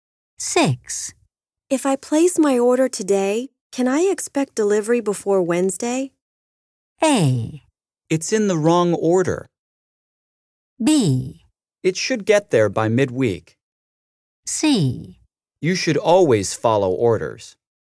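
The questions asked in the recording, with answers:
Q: If I place my order today, can I expect delivery before Wednesday?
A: B: It should get there by midweek.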